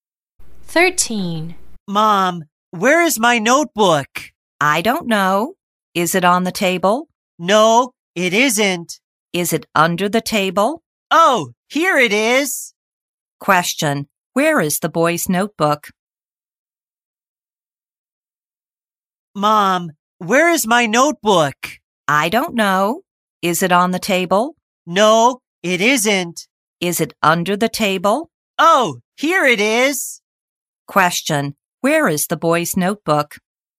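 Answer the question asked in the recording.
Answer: Under the table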